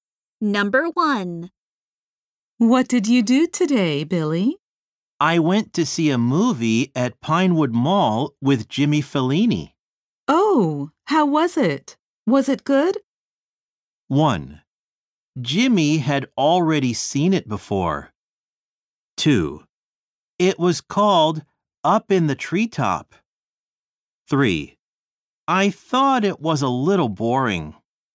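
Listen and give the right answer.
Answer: 3: I thought it was a little boring.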